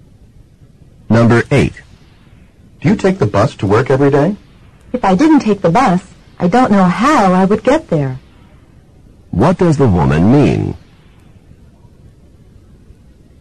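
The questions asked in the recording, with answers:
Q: What does the woman mean?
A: Yes, she takes the bus every day.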